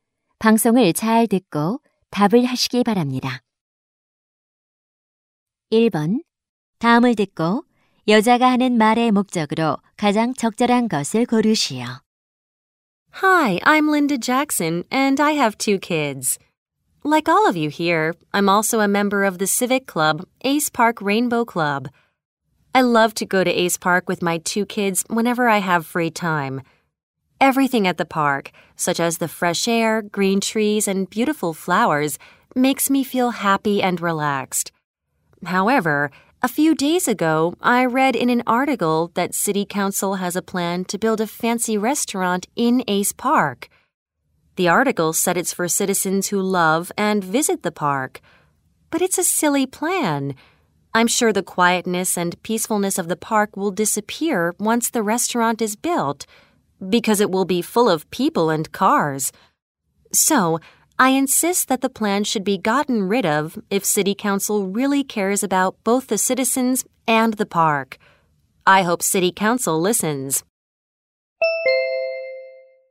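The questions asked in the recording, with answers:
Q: 다음을 듣고 여자가 하는 말의 목적으로 가장 적절한 것을 고르시오.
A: Ace Park에 고급 식당을 지으려는 시의회 계획에 반대하려고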